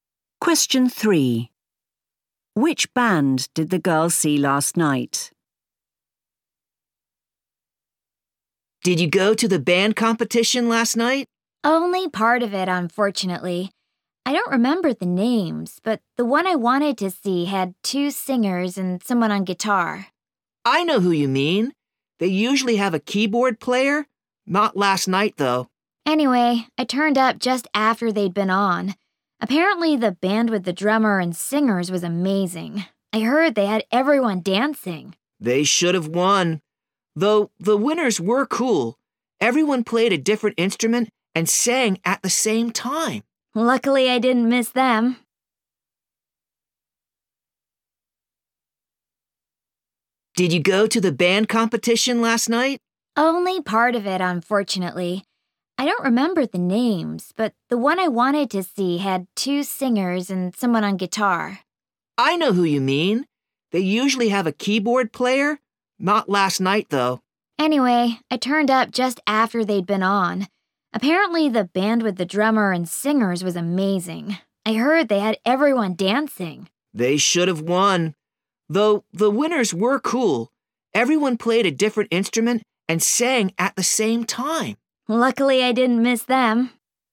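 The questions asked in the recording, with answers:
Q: Which band did the girl see last night?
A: The winners, where everyone played a different instrument and sang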